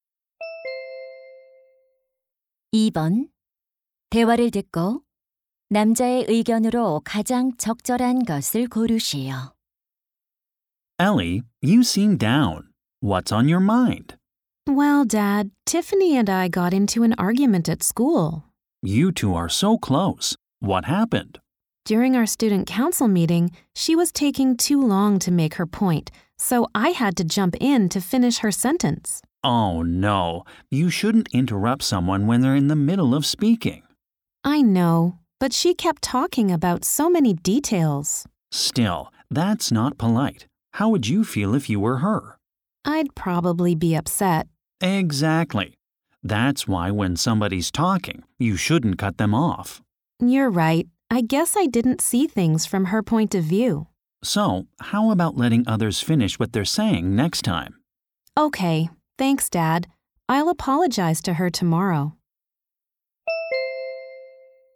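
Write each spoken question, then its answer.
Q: 대화를 듣고 남자의 의견으로 가장 적절한 것을 고르시오.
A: 다른 사람이 말할 때 말을 끊지 말아야 한다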